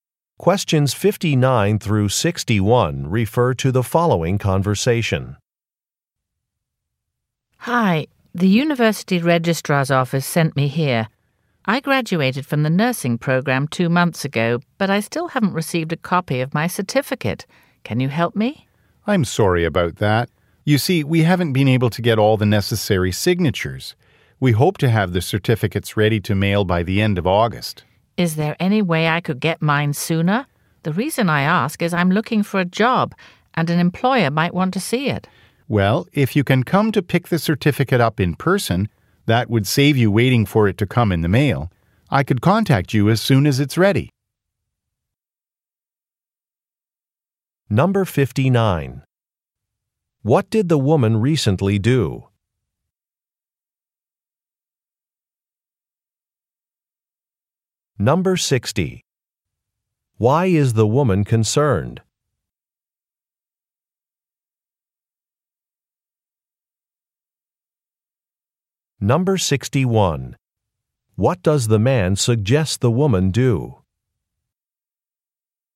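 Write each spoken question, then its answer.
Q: What did the woman recently do?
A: Graduated from a nursing program

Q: Why is the woman concerned?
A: She is looking for a job and an employer may want to see her certificate

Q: What does the man suggest the woman do?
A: Pick up the certificate in person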